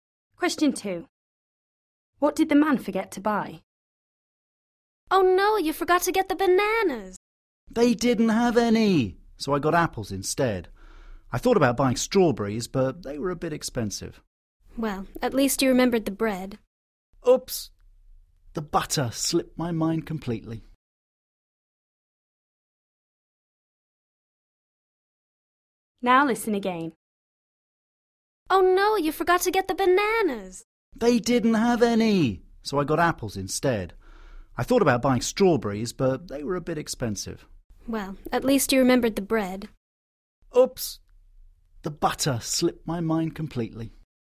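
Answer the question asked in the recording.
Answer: butter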